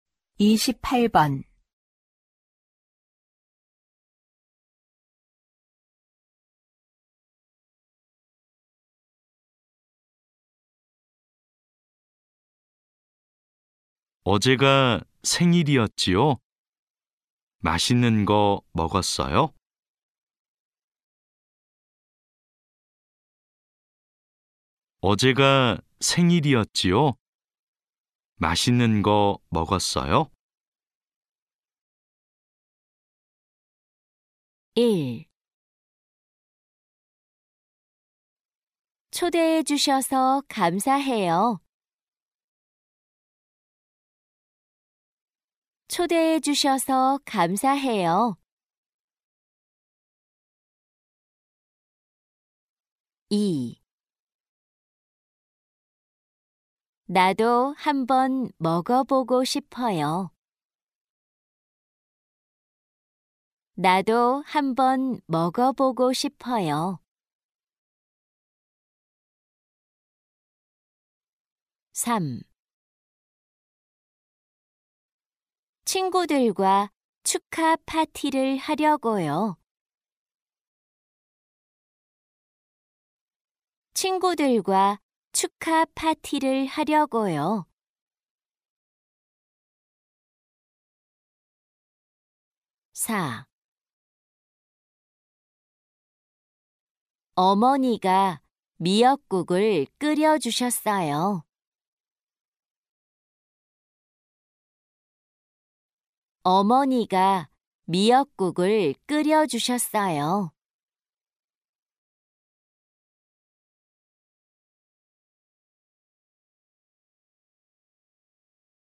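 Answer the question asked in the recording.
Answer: 4: 어머니가 미역국을 끓여주셨어요.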